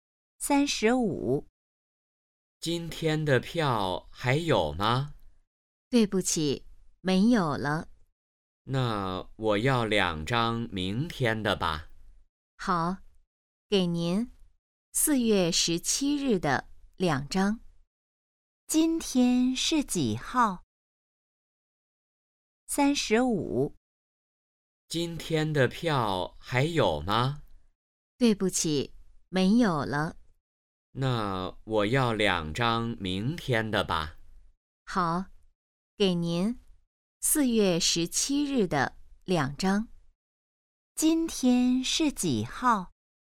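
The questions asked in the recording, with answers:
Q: 今天是几号?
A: 4月16日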